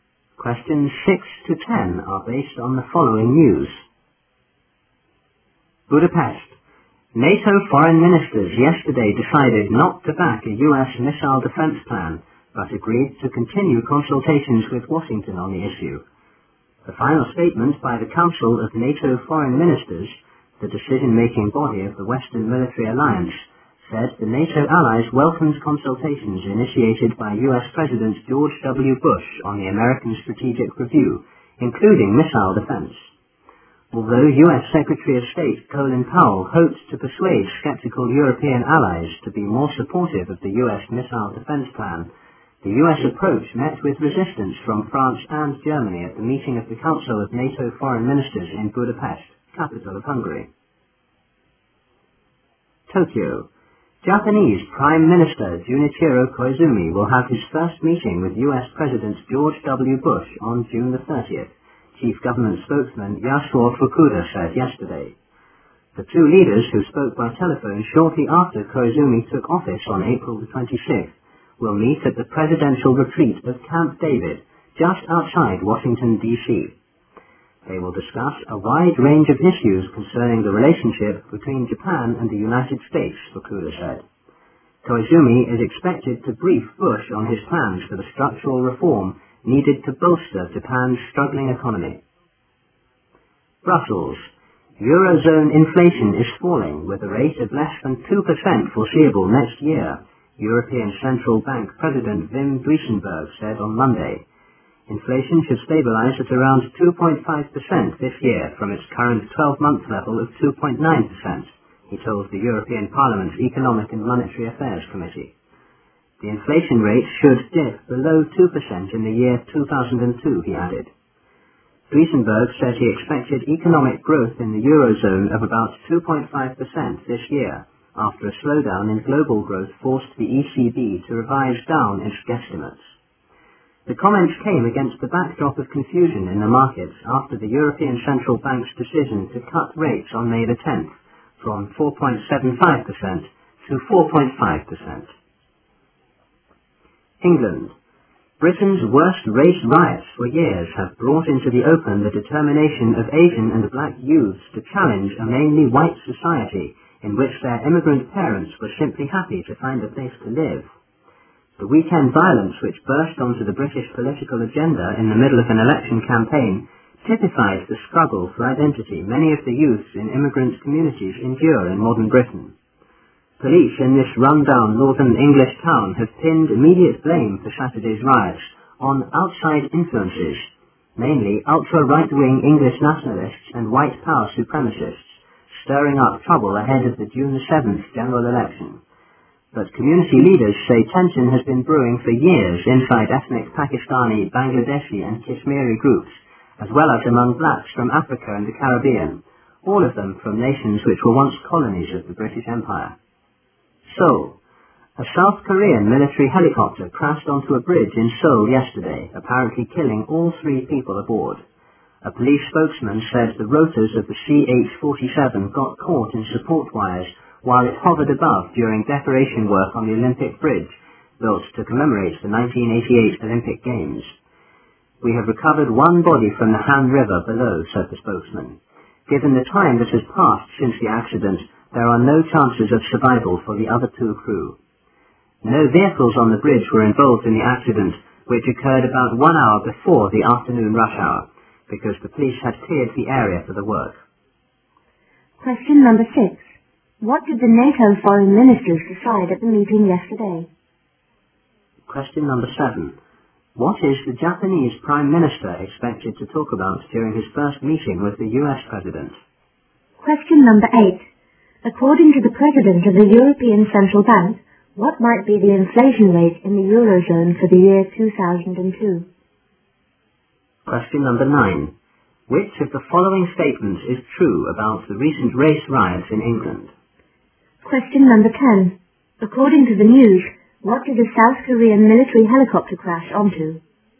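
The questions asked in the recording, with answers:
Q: What did the NATO foreign ministers decide at the meeting yesterday?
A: Not to back the US missile defense plan, but to keep consulting Washington on it

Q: What is the Japanese Prime Minister expected to talk about during his first meeting with the US President?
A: His plans for structural reform to bolster Japan's economy

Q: According to the President of the European Central Bank, what might be the inflation rate in the Eurozone for the year 2002?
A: Below 2%

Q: According to the news, what did a South Korean military helicopter crash onto?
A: The Olympic Bridge in Seoul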